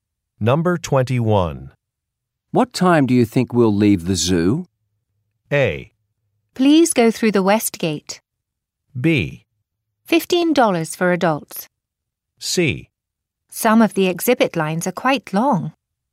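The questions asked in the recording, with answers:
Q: What time do you think we'll leave the zoo?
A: C: Some of the exhibit lines are quite long.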